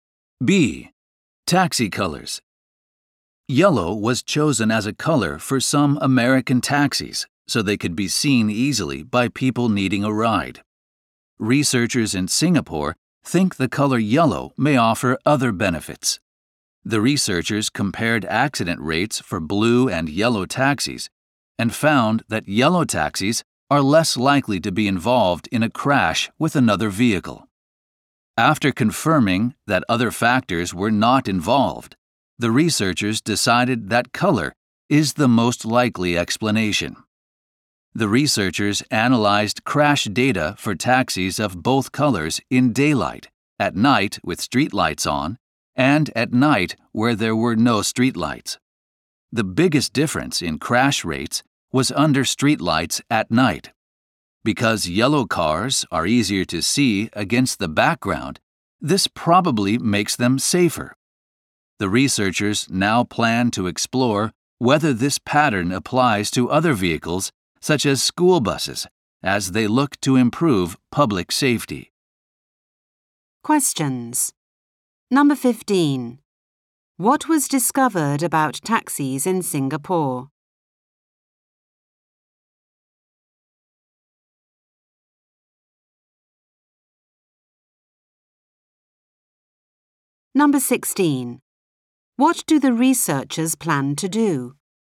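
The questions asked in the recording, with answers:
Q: What was discovered about taxis in Singapore?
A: Yellow taxis are less likely to crash with other vehicles

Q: What do the researchers plan to do?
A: See whether the pattern applies to other vehicles such as school buses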